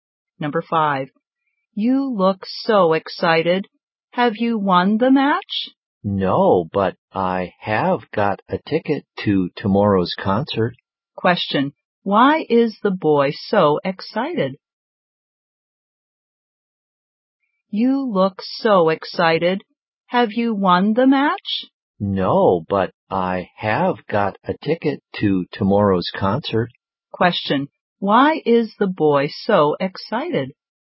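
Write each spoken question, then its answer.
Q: Why is the boy so excited?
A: He got a ticket to tomorrow's concert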